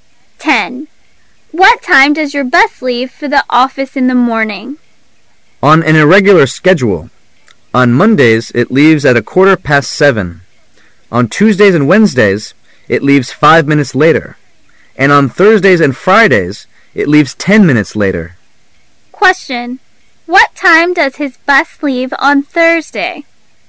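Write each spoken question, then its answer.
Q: What time does his bus leave on Thursday?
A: 7:25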